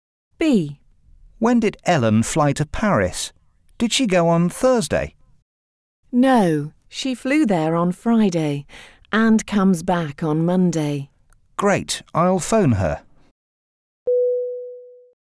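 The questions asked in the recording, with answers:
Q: When did Ellen fly to Paris?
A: On Friday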